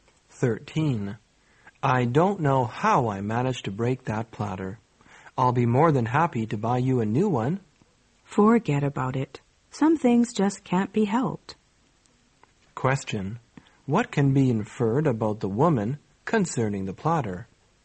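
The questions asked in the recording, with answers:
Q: What can be inferred about the woman concerning the platter?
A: She doesn't want the man to replace it; she forgives him.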